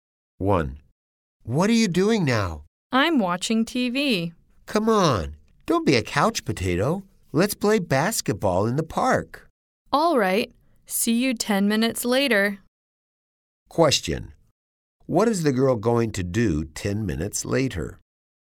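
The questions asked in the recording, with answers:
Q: What is the girl going to do 10 minutes later?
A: Play basketball in the park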